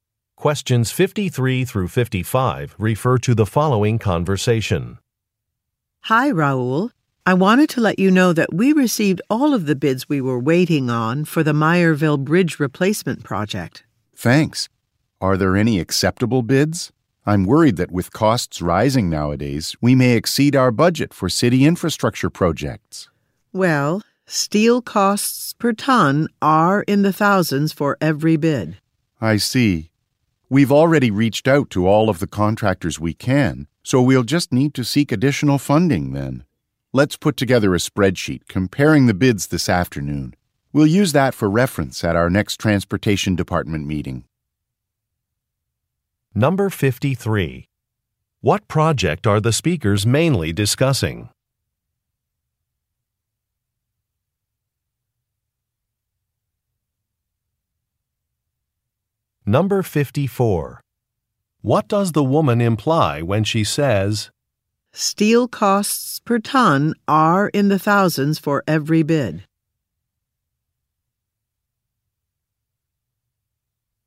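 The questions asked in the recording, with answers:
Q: What project are the speakers mainly discussing?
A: The Meyerville Bridge replacement

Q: "Steel costs per ton are in the thousands for every bid"?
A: All the bids will exceed the budget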